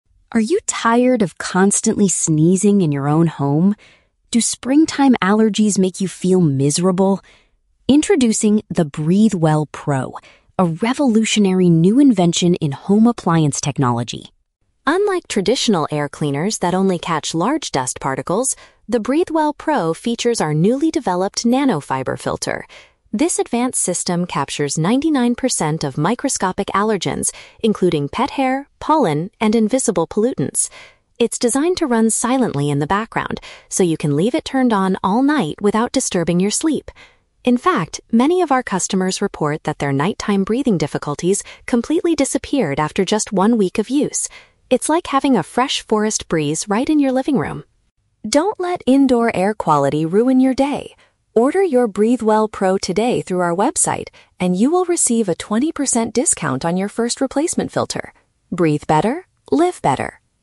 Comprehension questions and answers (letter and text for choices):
Listen to a radio advertisement for a new home appliance. For each question, choose the correct answer (A, B, or C).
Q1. What makes the BreatheWell Pro different from older machines?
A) It is built specifically to remove large dust from the floor.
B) It uses a new type of material to trap very small particles.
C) It produces a natural forest smell in the living room.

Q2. What is a major benefit of the device's design?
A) It operates so quietly that it will not wake the user up.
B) It automatically turns itself off when the air is clean.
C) It cures serious breathing diseases in just seven days.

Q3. What special offer is available for people who buy the product now?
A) A reduced price on the air purifier machine itself.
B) A free delivery service to the customer's house.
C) A cheaper price for a future maintenance part.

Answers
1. B) It uses a new type of material to trap very small particles.
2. A) It operates so quietly that it will not wake the user up.
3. C) A cheaper price for a future maintenance part.

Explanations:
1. The announcer says the machine features a "newly developed nano-fiber filter" that "captures 99% of microscopic allergens". Option (B) correctly paraphrases this ("new type of material" for "nano-fiber filter", "trap very small particles" for "captures microscopic allergens"). Option (A) is a trap; the audio says "Unlike traditional air cleaners that only catch large dust." Option (C) is a trap; "forest breeze" is used as a metaphor for feeling fresh, the machine doesn't actually produce a forest smell.
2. The audio states that it is "designed to run silently" and you can leave it on "without disturbing your sleep." Option (A) is a direct paraphrase of this benefit. Option (B) sounds like a smart feature but is not mentioned in the audio. Option (C) is a trap; customers said their "breathing difficulties disappeared," but claiming it "cures serious breathing diseases" is an exaggeration and factually incorrect.
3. The announcer offers a "20% discount on your first replacement filter." Option (C) paraphrases "discount" as "cheaper price" and "replacement filter" as "maintenance part." Option (A) is a trap; the discount is for the filter, not the main machine. Option (B) is a common online shopping offer but is not mentioned here.

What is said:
Announcer: Are you tired of constantly sneezing in your own home? Do springtime allergies make you feel miserable? Introducing the BreatheWell Pro, a revolutionary new invention in home appliance technology.
Unlike traditional air cleaners that only catch large dust particles, the BreatheWell Pro features our newly developed nano-fiber filter. This advanced system captures 99% of microscopic allergens, including pet hair, pollen, and invisible pollutants. It's designed to run silently in the background, so you can leave it turned on all night without disturbing your sleep. In fact, many of our customers report that their nighttime breathing difficulties completely disappeared after just one week of use. It's like having a fresh forest breeze right in your living room!
Don't let indoor air quality ruin your day. Order your BreatheWell Pro today through our website and you will receive a 20% discount on your first replacement filter. Breathe better, live better!